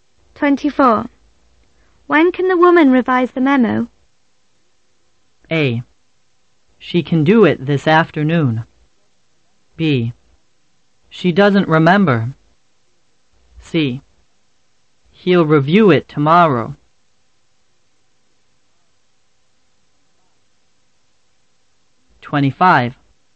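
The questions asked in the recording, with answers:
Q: When can the woman revise the memo?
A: A: She can do it this afternoon.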